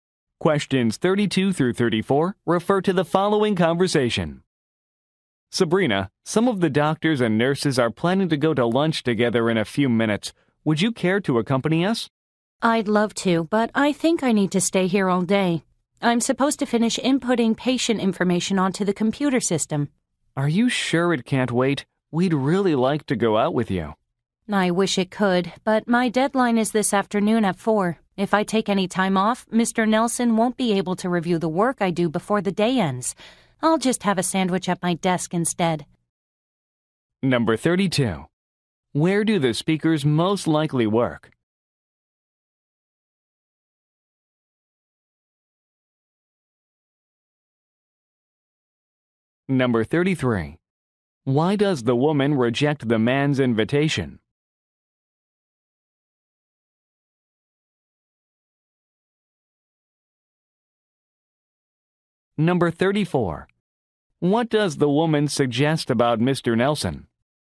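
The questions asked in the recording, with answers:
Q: Where do the speakers most likely work?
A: At a hospital

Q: Why does the woman reject the man's invitation?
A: She has to finish inputting patient information by a 4 p.m. deadline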